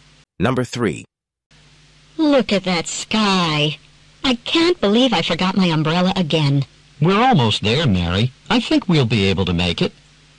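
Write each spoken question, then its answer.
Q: What can be inferred about the weather?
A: It looks like it is going to rain soon.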